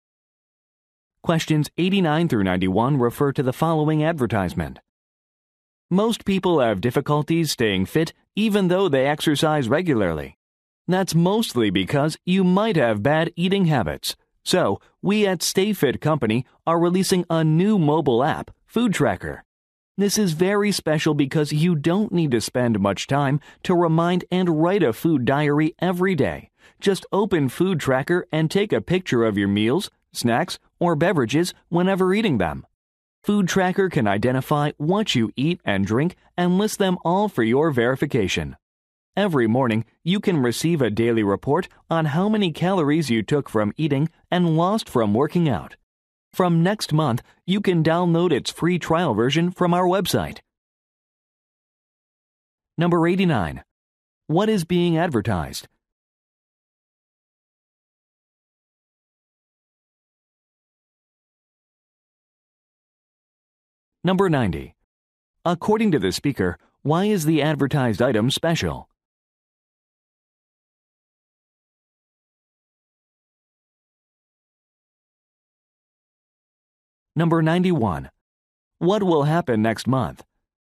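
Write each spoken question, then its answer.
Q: What is being advertised?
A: A mobile food-tracking app

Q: According to the speaker, why is the advertised item special?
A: You don't need to spend time writing a food diary; just take pictures

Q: What will happen next month?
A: A free trial version will be downloadable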